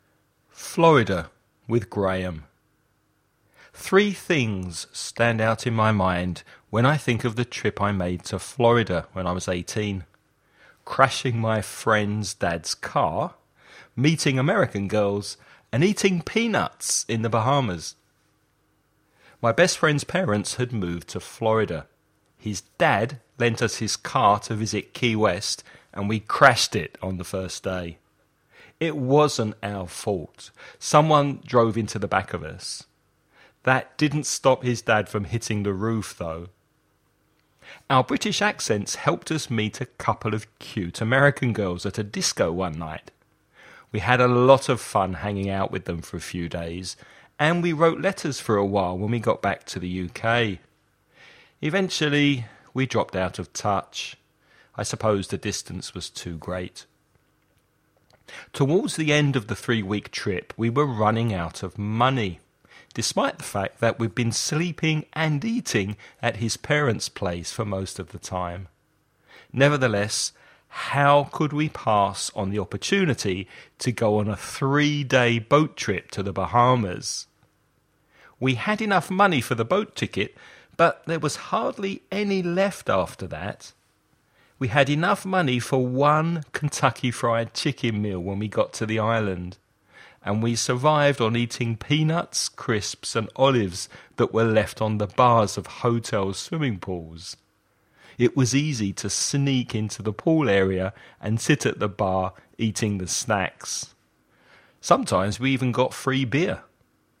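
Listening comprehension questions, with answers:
Before you listen about a man talking about a trip he once took to Florida, read the following questions.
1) What do you think 'hitting the roof' means?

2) What helped the boys meet the two American girls in the disco?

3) What does the speaker think was the reason that he and the American girl lost touch with one another?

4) How long was the trip to the Bahamas?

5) What three snacks did the boys get for free at the swimming pool bars?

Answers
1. Getting very angry
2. Their British accents
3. The distance was too great
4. Three days
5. Peanuts, crisps and olives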